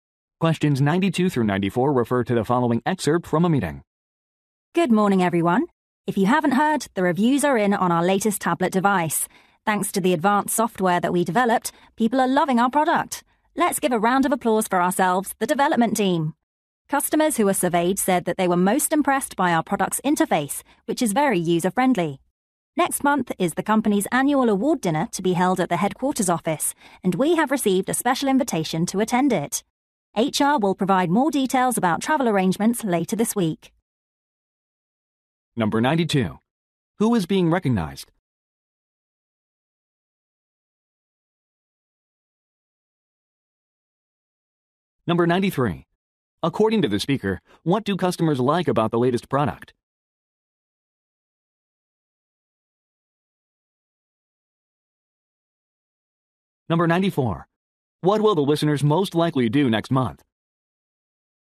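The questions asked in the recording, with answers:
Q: Who is being recognized?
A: The development team

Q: According to the speaker, what do customers like about the latest product?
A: Its user-friendly interface

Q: What will the listeners most likely do next month?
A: Attend the annual award dinner at headquarters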